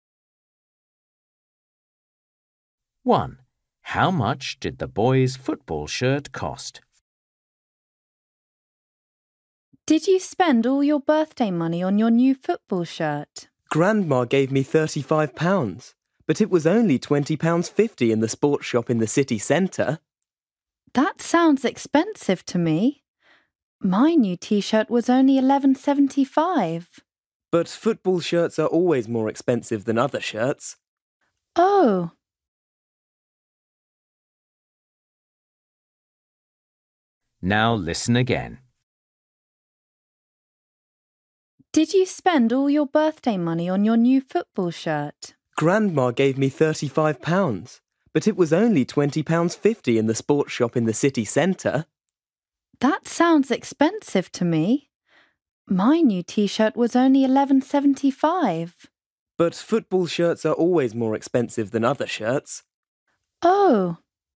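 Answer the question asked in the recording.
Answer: £20.50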